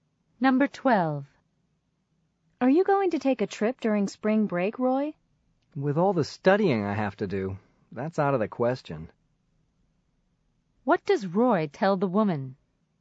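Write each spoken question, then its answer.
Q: What does Roy tell the woman?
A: He can't take a trip because he has to study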